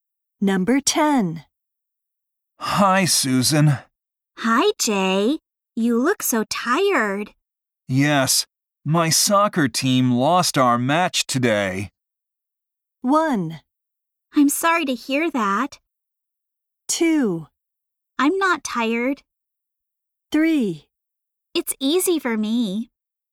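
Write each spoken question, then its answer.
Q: Yes, my soccer team lost our match today.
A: 1: I'm sorry to hear that.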